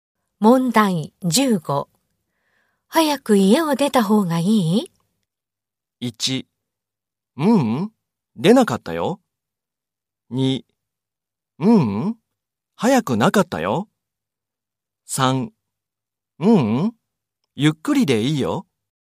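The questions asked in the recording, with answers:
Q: 早く家を出た方がいい?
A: 3: ゆっくりでいいよ。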